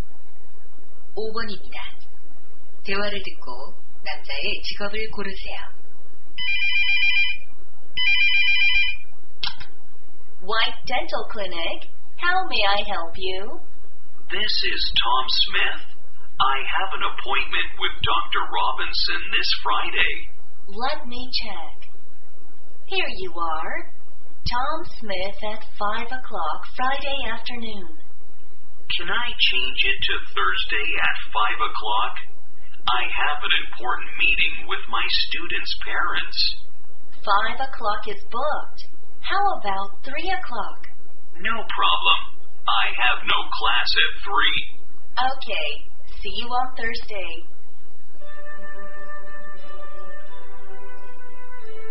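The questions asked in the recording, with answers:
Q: 대화를 듣고 남자의 직업을 고르세요.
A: 교사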